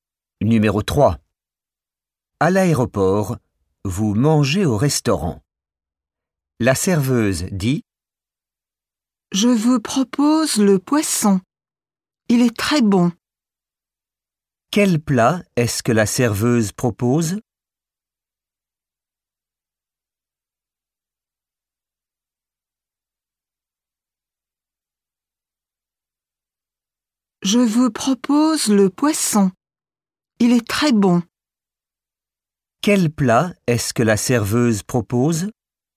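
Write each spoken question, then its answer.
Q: Quel plat est-ce que la serveuse propose?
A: Le poisson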